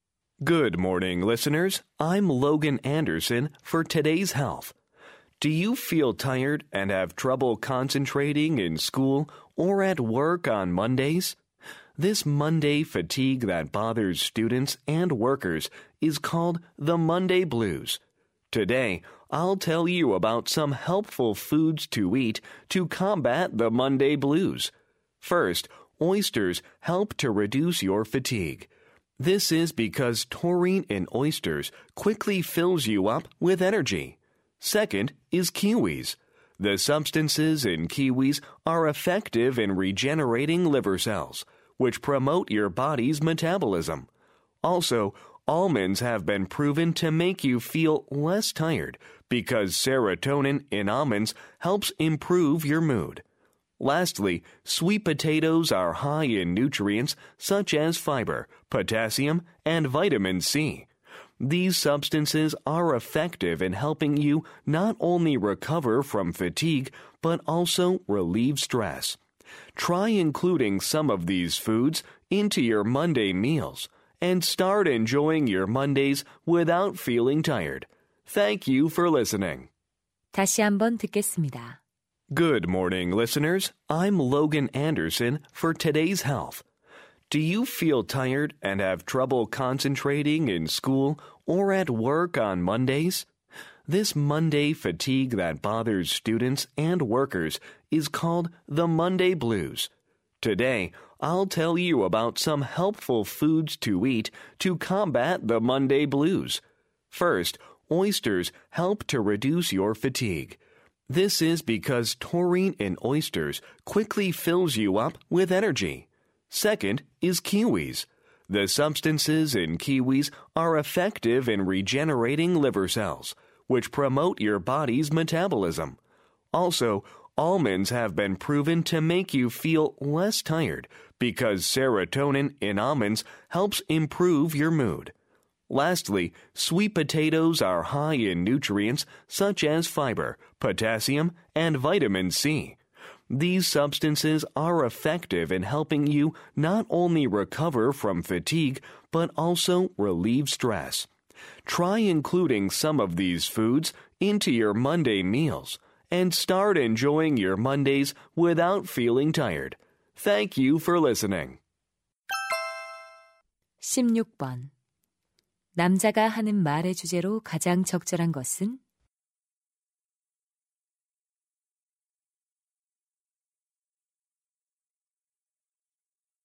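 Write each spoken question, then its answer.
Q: 남자가 하는 말의 주제로 가장 적절한 것은?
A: 월요병 극복에 도움이 되는 음식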